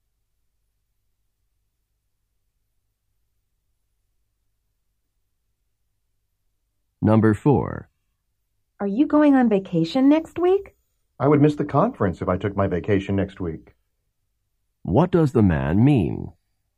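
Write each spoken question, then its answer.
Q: What does the man mean?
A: He is not going on vacation next week because of the conference.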